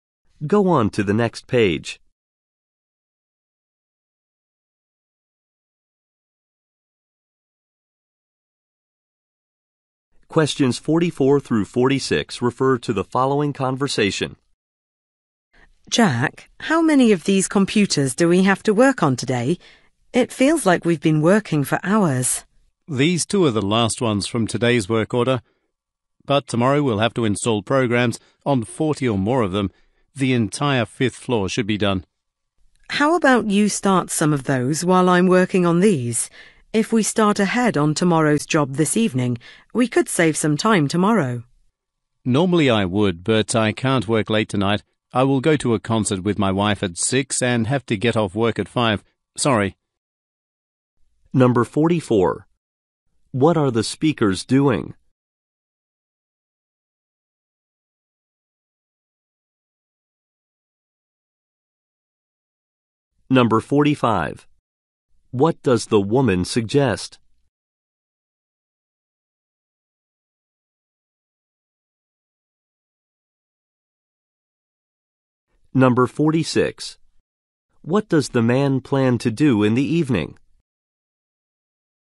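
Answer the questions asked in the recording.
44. Installing programs on computers
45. Starting tomorrow's job this evening
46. Go to a concert with his wife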